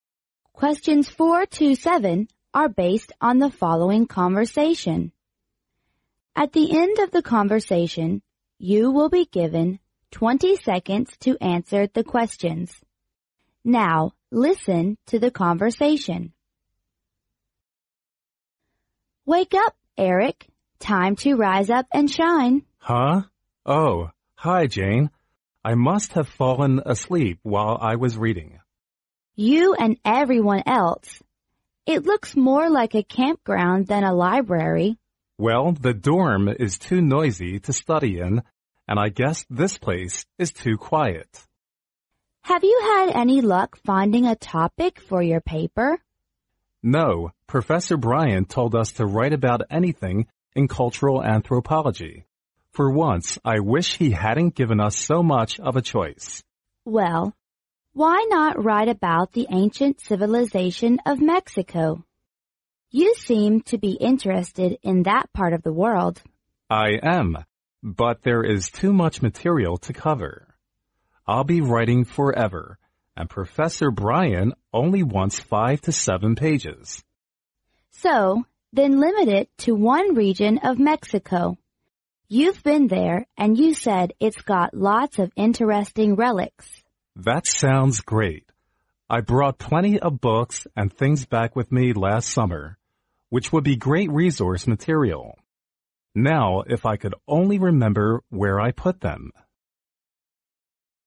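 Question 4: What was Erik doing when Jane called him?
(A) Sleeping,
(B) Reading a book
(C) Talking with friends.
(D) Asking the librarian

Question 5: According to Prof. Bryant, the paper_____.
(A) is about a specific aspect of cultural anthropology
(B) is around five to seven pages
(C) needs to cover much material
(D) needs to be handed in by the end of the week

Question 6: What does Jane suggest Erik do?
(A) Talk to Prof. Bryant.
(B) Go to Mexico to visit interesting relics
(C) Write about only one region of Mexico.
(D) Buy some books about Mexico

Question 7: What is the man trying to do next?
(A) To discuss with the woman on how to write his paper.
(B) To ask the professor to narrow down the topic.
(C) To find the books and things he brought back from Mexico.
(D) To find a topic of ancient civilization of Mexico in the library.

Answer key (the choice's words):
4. Sleeping,
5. is around five to seven pages
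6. Write about only one region of Mexico.
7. To find the books and things he brought back from Mexico.

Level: 英语四级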